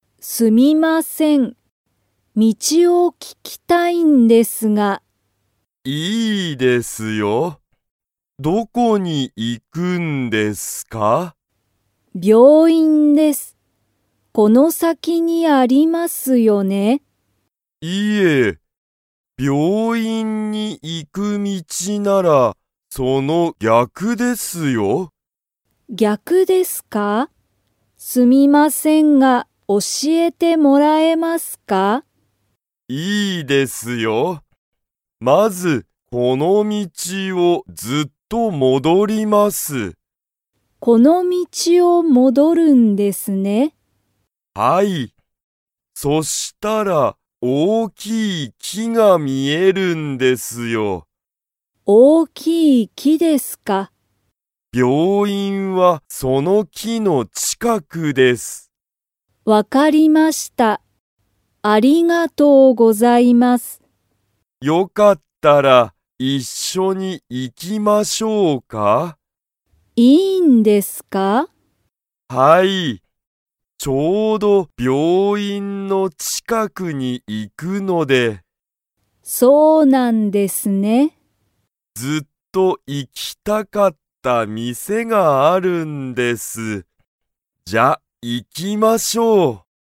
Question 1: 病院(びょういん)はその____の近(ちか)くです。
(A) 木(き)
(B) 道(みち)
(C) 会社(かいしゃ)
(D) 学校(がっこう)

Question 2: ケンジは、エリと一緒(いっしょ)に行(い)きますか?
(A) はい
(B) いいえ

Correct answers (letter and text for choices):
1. (A) 木(き)
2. (A) はい

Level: Level 2